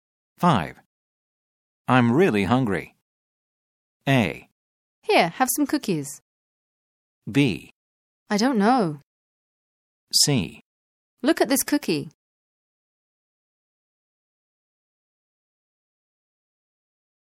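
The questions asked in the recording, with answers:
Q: I'm really hungry.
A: A: Here, have some cookies.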